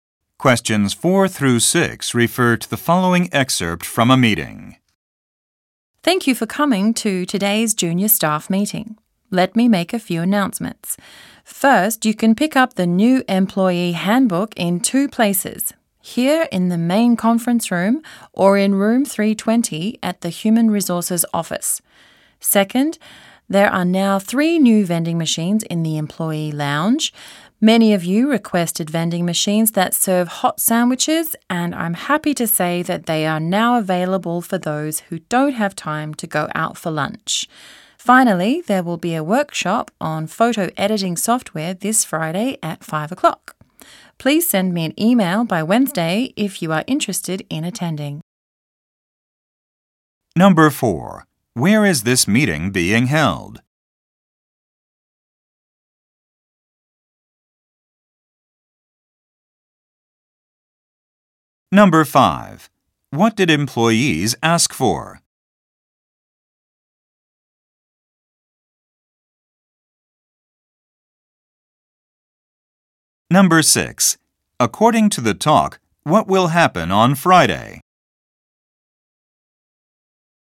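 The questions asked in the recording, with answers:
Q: Where is this meeting being held?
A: In the main conference room

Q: What did employees ask for?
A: Vending machines that serve hot sandwiches

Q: According to the talk, what will happen on Friday?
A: A workshop on photo editing software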